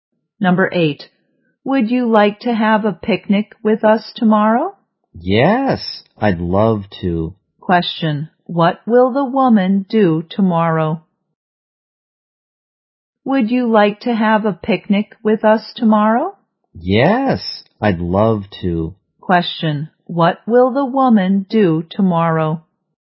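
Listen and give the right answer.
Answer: Have a picnic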